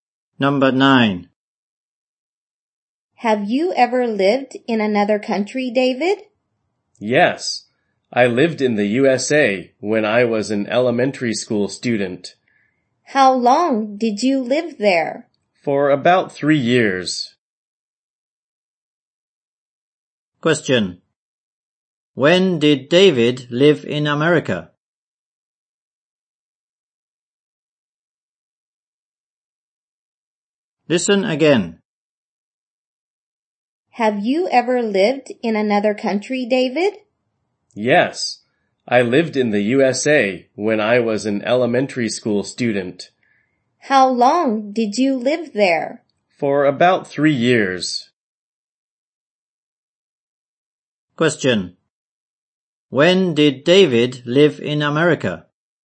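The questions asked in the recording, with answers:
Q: When did David live in America?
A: When he was an elementary school student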